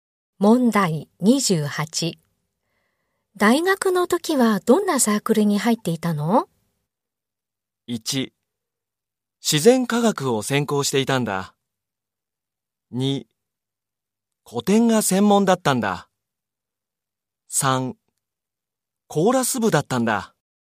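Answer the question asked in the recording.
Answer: 3: コーラス部だったんだ。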